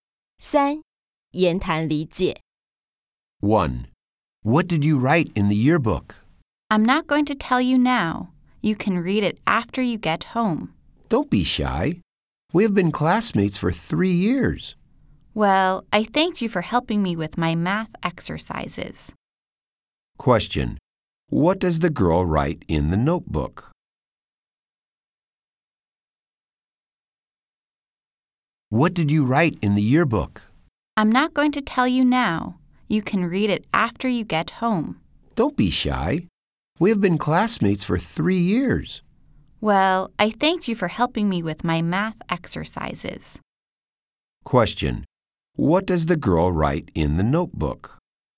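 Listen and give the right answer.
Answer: Thanks for helping her with her math exercises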